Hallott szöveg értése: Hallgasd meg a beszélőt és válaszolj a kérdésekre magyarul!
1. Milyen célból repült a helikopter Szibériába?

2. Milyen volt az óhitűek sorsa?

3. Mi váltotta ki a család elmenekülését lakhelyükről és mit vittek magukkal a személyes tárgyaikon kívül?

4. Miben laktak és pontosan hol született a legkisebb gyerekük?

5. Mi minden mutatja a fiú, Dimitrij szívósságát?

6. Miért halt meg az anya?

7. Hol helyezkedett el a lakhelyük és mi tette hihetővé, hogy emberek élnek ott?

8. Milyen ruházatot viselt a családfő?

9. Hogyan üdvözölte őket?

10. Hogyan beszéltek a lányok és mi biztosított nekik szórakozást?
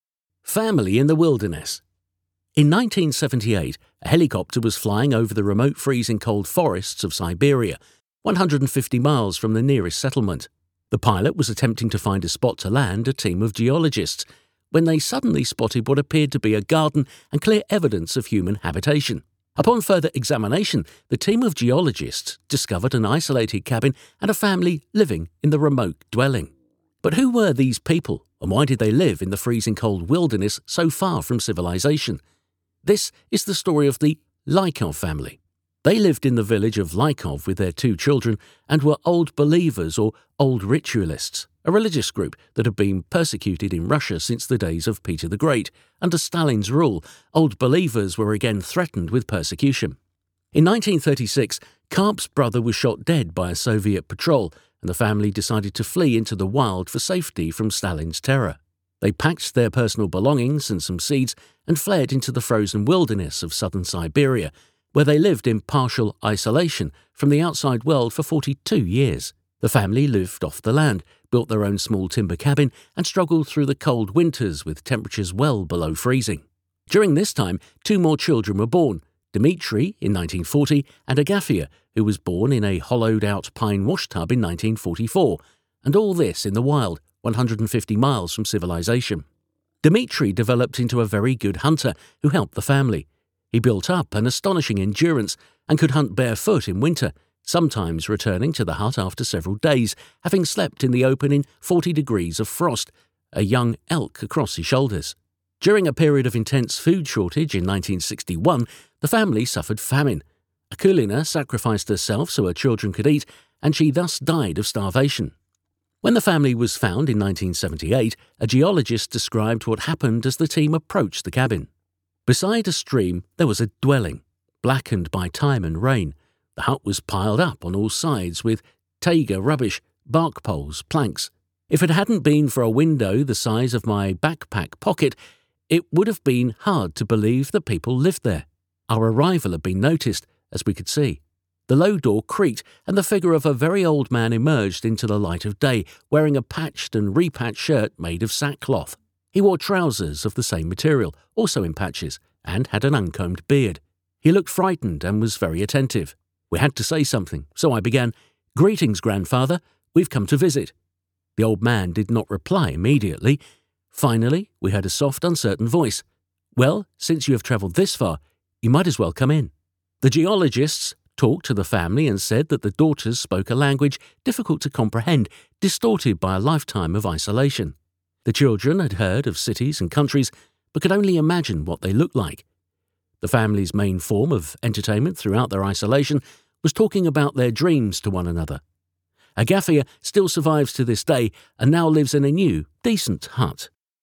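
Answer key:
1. Hogy leszállóhelyet találjon egy geológuscsoport számára.
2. Nagy Péter óta üldözték őket Oroszországban, Sztálin alatt újra üldöztetés fenyegette őket.
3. Karp testvérét 1936-ban lelőtte egy szovjet járőr; magokat vittek.
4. Saját építésű kis gerendakunyhóban; Agafia egy kivájt fenyőfa mosódézsában született.
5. Télen mezítláb vadászott, napokig a szabadban aludt -40 fokban, és egy fiatal jávorszarvast hozott a vállán.
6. Az 1961-es éhínségben feláldozta magát, hogy a gyerekei ehessenek, és éhen halt.
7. Egy patak mellett; egy hátizsákzseb méretű ablak.
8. Zsákvászonból készült, sokszor foltozott inget és ugyanilyen foltos nadrágot.
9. „Ha már ilyen messzire utaztatok, akár be is jöhettek."
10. Nehezen érthető, az elszigeteltség miatt torzult nyelven; az álmaikról való beszélgetés.

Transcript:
Family in the Wilderness
In 1978 a helicopter was flying over the remote freezing-cold forests of Siberia, 150 miles from the nearest settlement. 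The pilot was attempting to find a spot to land a team of geologists, when they suddenly spotted what appeared to be a garden and clear evidence of human habitation. Upon further examination the team of geologists discovered an isolated cabin and a family living in the remote dwelling. But who were these people and why did they live in the freezing-cold wilderness so far from civilization? This is the story of the Lykov family.
They lived in the village of Lykov with their two children and were Old Believers or Old Ritualists, a religious group that had been persecuted in Russia since the days of Peter the Great. Under Stalin's rule, Old Believers were again threatened with persecution.
In 1936, Karp's brother was shot dead by a Soviet patrol and the family decided to flee into the wild for safety from Stalin's terror. They packed their personal belongings and some seeds and fled into the frozen wilderness of southern Siberia where they lived in partial isolation from the outside world for 42 years. 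The family lived off the land, built their own small timber cabin and struggled through the cold winters with temperatures well below freezing. During this time two more children were born: Dmitry in 1940 and Agafia who was born in a hollowed-out pine washtub in 1944 – and all this in the wild, 150 miles from civilization.
Dmitry developed into a very good hunter who helped the family. He built up astonishing endurance, and could hunt barefoot in winter, sometimes returning to the hut after several days, having slept in the open in 40 degrees of frost, a young elk across his shoulders.
During a period of intense foot shortage, in 1961, the family suffered famine. Akulina sacrificed herself so her children could eat and she thus died of starvation.
When the family was found in 1978, a geologist described what happened as the team approached the cabin:
"Beside a stream there was a dwelling. 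Blackened by time and rain, the hut was piled up on all sides with taiga rubbish—bark, poles, planks. If it hadn't been for a window the size of my backpack pocket, it would have been hard to believe that people lived there. Our arrival had been noticed, as we could see. The low door creaked, and the figure of a very old man emerged into the light of day, wearing a patched and repatched shirt made of sack cloth. He wore trousers of the same material, also in patches, and had an uncombed beard. He looked frightened and was very attentive. We had to say something, so I began: 'Greetings, grandfather! We've come to visit!' The old man did not reply immediately. Finally, we heard a soft, uncertain voice: 'Well, since you have travelled this far, you might as well come in.'"
The geologists talked to the family and said that the daughters spoke a language, difficult to comprehend, distorted by a lifetime of isolation. 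The children had heard of cities and countries but could only imagine what they looked like. The family's main form of entertainment throughout their isolation was talking about their dreams to one another.
Agafia still survives to this day and now lives in a new, decent hut.

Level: C1 (felsőfok)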